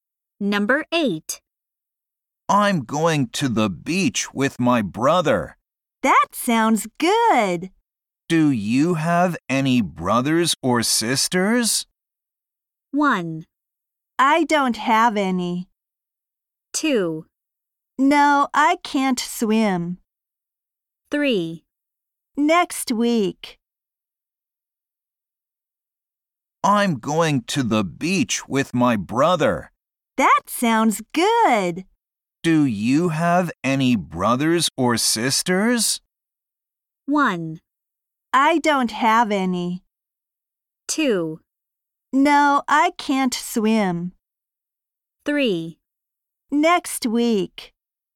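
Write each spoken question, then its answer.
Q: Do you have any brothers or sisters?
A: 1: I don't have any.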